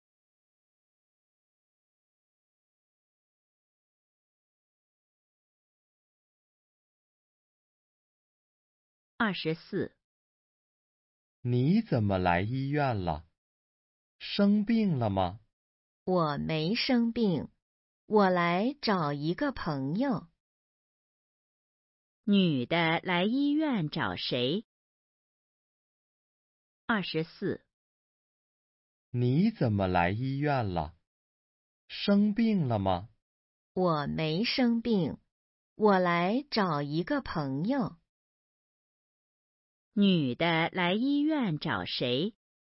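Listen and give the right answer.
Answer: 一个朋友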